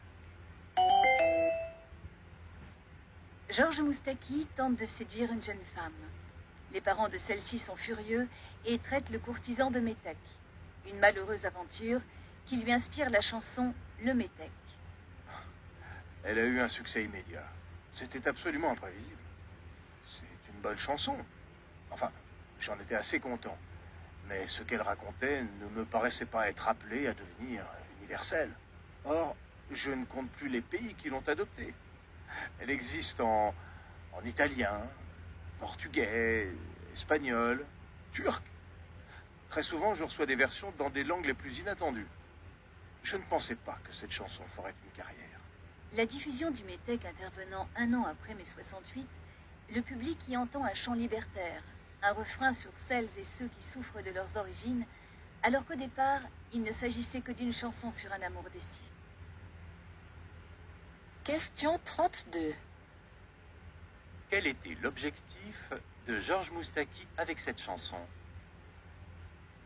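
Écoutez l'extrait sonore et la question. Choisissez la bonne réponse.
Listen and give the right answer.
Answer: Raconter un amour déçu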